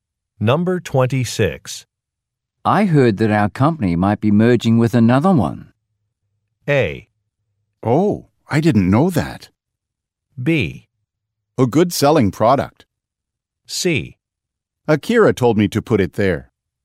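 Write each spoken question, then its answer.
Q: I heard that our company might be merging with another one.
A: A: Oh, I didn't know that.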